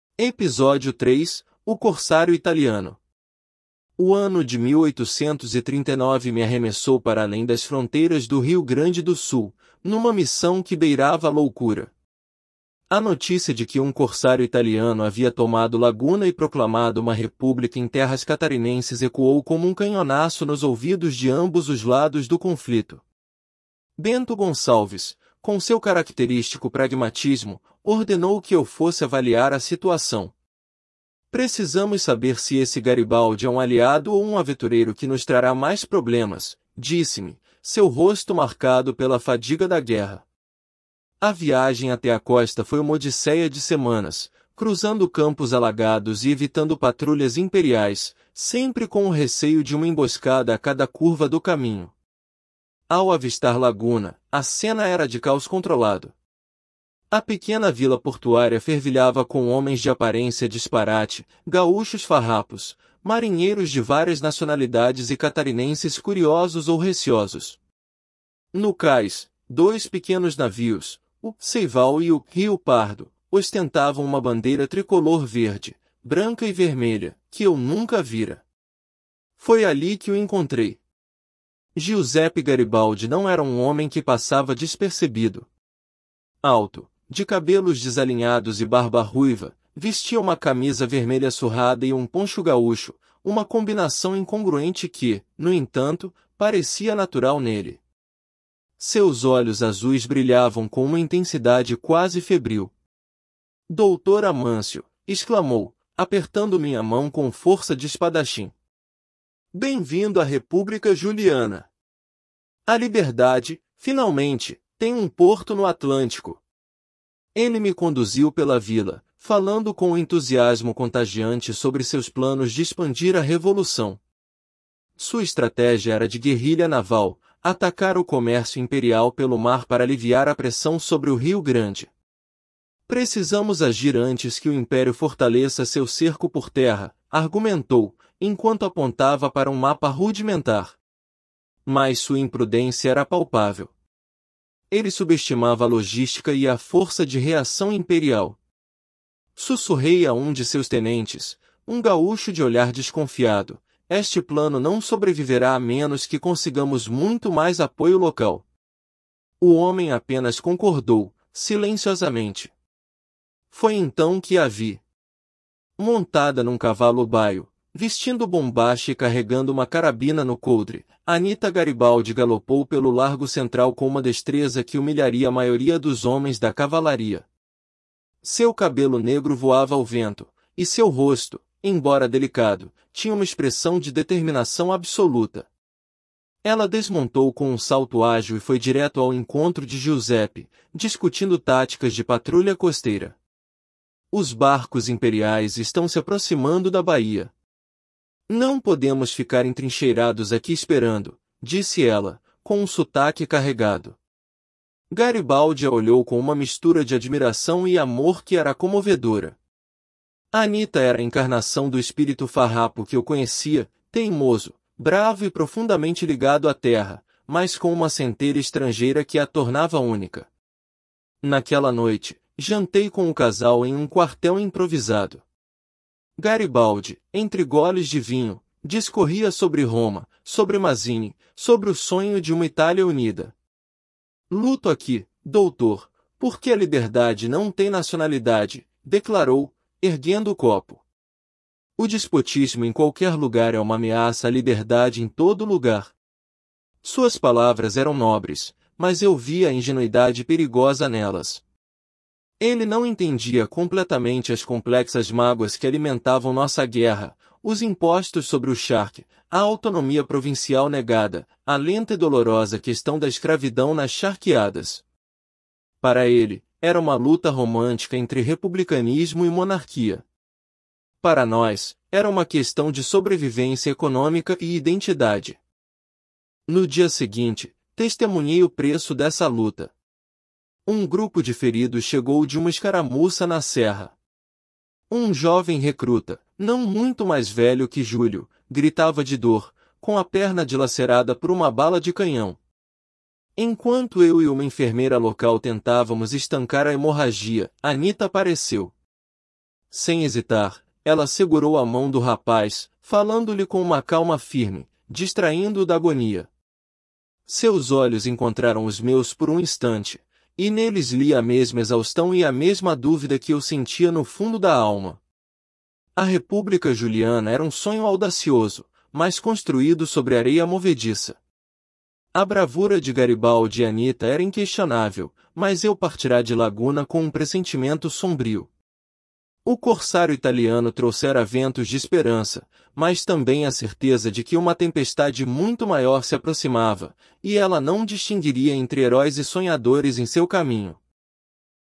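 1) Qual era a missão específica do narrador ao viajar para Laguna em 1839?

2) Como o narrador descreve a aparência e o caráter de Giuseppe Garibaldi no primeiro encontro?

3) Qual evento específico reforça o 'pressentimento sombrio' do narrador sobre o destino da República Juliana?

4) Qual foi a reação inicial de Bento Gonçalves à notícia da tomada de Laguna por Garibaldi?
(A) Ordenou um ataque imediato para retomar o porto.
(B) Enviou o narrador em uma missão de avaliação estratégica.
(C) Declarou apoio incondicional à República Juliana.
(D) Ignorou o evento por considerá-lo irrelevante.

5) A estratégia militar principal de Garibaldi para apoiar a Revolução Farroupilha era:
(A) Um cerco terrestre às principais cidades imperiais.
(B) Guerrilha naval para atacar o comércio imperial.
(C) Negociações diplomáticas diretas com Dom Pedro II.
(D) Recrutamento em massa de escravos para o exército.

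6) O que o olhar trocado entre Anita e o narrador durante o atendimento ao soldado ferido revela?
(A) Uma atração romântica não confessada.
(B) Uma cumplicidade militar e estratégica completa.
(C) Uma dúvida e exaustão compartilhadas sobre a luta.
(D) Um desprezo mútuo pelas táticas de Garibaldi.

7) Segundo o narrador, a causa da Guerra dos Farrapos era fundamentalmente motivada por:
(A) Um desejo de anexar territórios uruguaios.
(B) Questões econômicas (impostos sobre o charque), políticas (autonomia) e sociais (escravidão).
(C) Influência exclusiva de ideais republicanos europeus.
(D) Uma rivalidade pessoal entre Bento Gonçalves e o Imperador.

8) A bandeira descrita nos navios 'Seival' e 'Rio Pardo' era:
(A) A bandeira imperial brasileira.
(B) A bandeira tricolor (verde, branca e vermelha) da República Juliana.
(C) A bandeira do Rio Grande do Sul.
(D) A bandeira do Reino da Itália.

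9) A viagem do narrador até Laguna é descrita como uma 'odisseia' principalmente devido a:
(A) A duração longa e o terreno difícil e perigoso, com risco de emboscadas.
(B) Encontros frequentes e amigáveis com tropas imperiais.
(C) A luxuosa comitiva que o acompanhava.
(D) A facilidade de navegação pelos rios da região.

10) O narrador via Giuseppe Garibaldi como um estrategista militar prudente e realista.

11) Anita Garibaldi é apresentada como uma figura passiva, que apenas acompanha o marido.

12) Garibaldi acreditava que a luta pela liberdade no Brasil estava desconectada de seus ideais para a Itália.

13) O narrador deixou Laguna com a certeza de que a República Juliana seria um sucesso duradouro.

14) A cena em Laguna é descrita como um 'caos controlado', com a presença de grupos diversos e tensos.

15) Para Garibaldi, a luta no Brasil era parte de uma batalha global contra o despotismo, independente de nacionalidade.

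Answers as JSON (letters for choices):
{"1": "Avaliar a situação a mando de Bento Gonçalves: saber se Garibaldi era aliado ou aventureiro.", "2": "Alto, cabelos desalinhados, barba ruiva, camisa vermelha e poncho, olhos azuis febris; entusiasta mas imprudente.", "3": "A chegada dos feridos e o olhar de exaustão e dúvida trocado com Anita.", "4": "B", "5": "B", "6": "C", "7": "B", "8": "B", "9": "A", "10": "Falso", "11": "Falso", "12": "Falso", "13": "Falso", "14": "Verdadeiro", "15": "Verdadeiro"}

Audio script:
Episódio 3: O Corsário Italiano – TEST
Episódio 3: O Corsário Italiano
O ano de 1839 me arremessou para além das fronteiras do Rio Grande do Sul, numa missão que beirava a loucura. A notícia de que um corsário italiano havia tomado Laguna e proclamado uma república em terras catarinenses ecoou como um canhonaço nos ouvidos de ambos os lados do conflito. Bento Gonçalves, com seu característico pragmatismo, ordenou que eu fosse avaliar a situação. 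'Precisamos saber se esse Garibaldi é um aliado ou um aventureiro que nos trará mais problemas', disse-me, seu rosto marcado pela fadiga da guerra. A viagem até a costa foi uma odisseia de semanas, cruzando campos alagados e evitando patrulhas imperiais, sempre com o receio de uma emboscada a cada curva do caminho.
Ao avistar Laguna, a cena era de caos controlado. A pequena vila portuária fervilhava com homens de aparência disparate – gaúchos farrapos, marinheiros de várias nacionalidades e catarinenses curiosos ou receosos. No cais, dois pequenos navios, o 'Seival' e o 'Rio Pardo', ostentavam uma bandeira tricolor verde, branca e vermelha, que eu nunca vira. Foi ali que o encontrei. Giuseppe Garibaldi não era um homem que passava despercebido. Alto, de cabelos desalinhados e barba ruiva, vestia uma camisa vermelha surrada e um poncho gaúcho, uma combinação incongruente que, no entanto, parecia natural nele. 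Seus olhos azuis brilhavam com uma intensidade quase febril. 'Doutor Amâncio!', exclamou, apertando minha mão com força de espadachim. 'Bem-vindo à República Juliana! A liberdade, finalmente, tem um porto no Atlântico!'
Ele me conduziu pela vila, falando com um entusiasmo contagiante sobre seus planos de expandir a revolução. Sua estratégia era de guerrilha naval, atacar o comércio imperial pelo mar para aliviar a pressão sobre o Rio Grande. 'Precisamos agir antes que o Império fortaleça seu cerco por terra', argumentou, enquanto apontava para um mapa rudimentar. Mas sua imprudência era palpável. Ele subestimava a logística e a força de reação imperial. Sussurrei a um de seus tenentes, um gaúcho de olhar desconfiado: 'Este plano não sobreviverá a menos que consigamos muito mais apoio local'. O homem apenas concordou, silenciosamente.
Foi então que a vi. Montada num cavalo baio, vestindo bombacha e carregando uma carabina no coldre, Anita Garibaldi galopou pelo largo central com uma destreza que humilharia a maioria dos homens da cavalaria. 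Seu cabelo negro voava ao vento, e seu rosto, embora delicado, tinha uma expressão de determinação absoluta. Ela desmontou com um salto ágil e foi direto ao encontro de Giuseppe, discutindo táticas de patrulha costeira. 'Os barcos imperiais estão se aproximando da baía. Não podemos ficar entrincheirados aqui esperando', disse ela, com um sotaque carregado. Garibaldi a olhou com uma mistura de admiração e amor que era comovedora. Anita era a encarnação do espírito farrapo que eu conhecia – teimoso, bravo e profundamente ligado à terra –, mas com uma centelha estrangeira que a tornava única.
Naquela noite, jantei com o casal em um quartel improvisado. Garibaldi, entre goles de vinho, discorria sobre Roma, sobre Mazzini, sobre o sonho de uma Itália unida. 'Luto aqui, Doutor, porque a liberdade não tem nacionalidade', declarou, erguendo o copo. 'O despotismo em qualquer lugar é uma ameaça à liberdade em todo lugar.' Suas palavras eram nobres, mas eu via a ingenuidade perigosa nelas. 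Ele não entendia completamente as complexas mágoas que alimentavam nossa guerra: os impostos sobre o charque, a autonomia provincial negada, a lenta e dolorosa questão da escravidão nas charqueadas. Para ele, era uma luta romântica entre republicanismo e monarquia. Para nós, era uma questão de sobrevivência econômica e identidade.
No dia seguinte, testemunhei o preço dessa luta. Um grupo de feridos chegou de uma escaramuça na serra. Um jovem recruta, não muito mais velho que Júlio, gritava de dor, com a perna dilacerada por uma bala de canhão. Enquanto eu e uma enfermeira local tentávamos estancar a hemorragia, Anita apareceu. Sem hesitar, ela segurou a mão do rapaz, falando-lhe com uma calma firme, distraindo-o da agonia. Seus olhos encontraram os meus por um instante, e neles li a mesma exaustão e a mesma dúvida que eu sentia no fundo da alma. A República Juliana era um sonho audacioso, mas construído sobre areia movediça. 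A bravura de Garibaldi e Anita era inquestionável, mas eu partira de Laguna com um pressentimento sombrio. O corsário italiano trouxera ventos de esperança, mas também a certeza de que uma tempestade muito maior se aproximava, e ela não distinguiria entre heróis e sonhadores em seu caminho.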